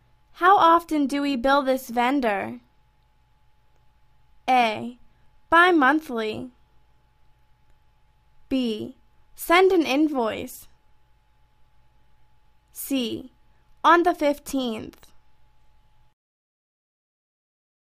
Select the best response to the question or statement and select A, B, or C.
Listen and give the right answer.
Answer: Bi-monthly.